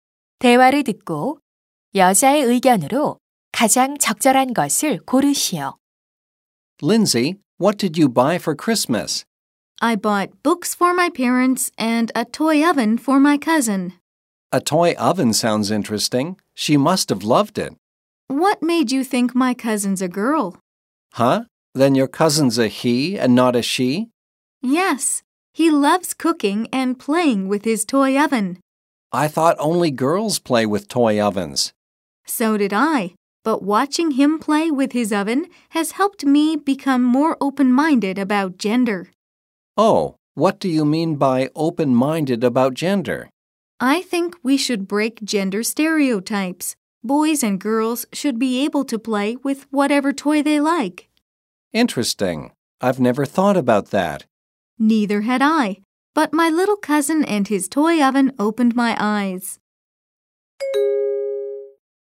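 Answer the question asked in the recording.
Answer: 아이들은 성별 고정관념 없이 원하는 장난감을 가지고 놀 수 있어야 한다.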